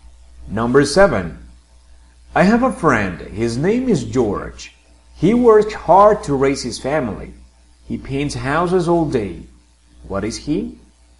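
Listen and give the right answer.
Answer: a house painter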